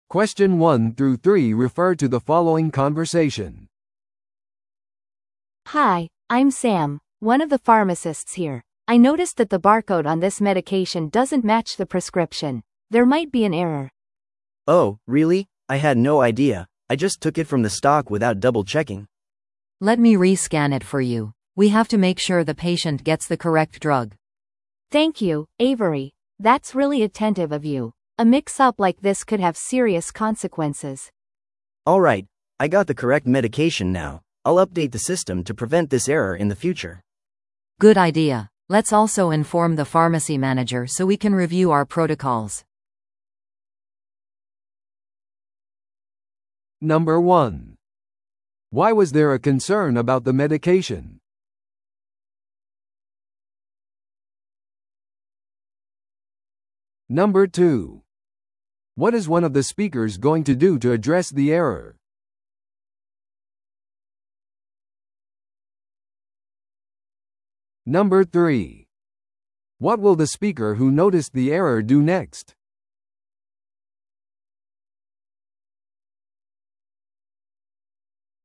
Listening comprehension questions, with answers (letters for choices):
Listen to the audio below and answer the questions.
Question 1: Why was there a concern about the medication?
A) 薬の使用期限が切れていた。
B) バーコードが処方箋と一致していなかった。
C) 患者が副作用を報告した。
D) 薬が在庫切れだった。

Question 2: What is one of the speakers going to do to address the error?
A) 薬を再スキャンする。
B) その薬の新しい在庫を注文する。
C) 患者に説明するために電話をする。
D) 不正確な薬を全て廃棄する。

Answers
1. B
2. A

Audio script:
A: Hi, I'm Sam, one of the pharmacists here. I noticed that the barcode on this medication doesn't match the prescription. There might be an error.
B: Oh, really? I had no idea. I just took it from the stock without double-checking.
C: Let me re-scan it for you. We have to make sure the patient gets the correct drug.
A: Thank you, Avery. That's really attentive of you. A mix-up like this could have serious consequences.
B: Alright, I got the correct medication now. I'll update the system to prevent this error in the future.
C: Good idea. Let's also inform the pharmacy manager so we can review our protocols.